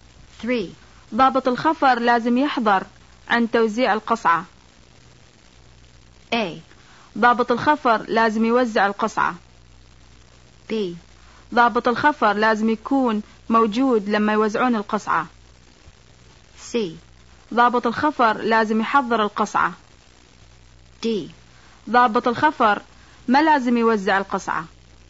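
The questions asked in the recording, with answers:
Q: ضابط الخفر لازم يحضر عند توزيع القصعة.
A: B: ضابط الخفر لازم يكون موجود لما يوزعون القصعة.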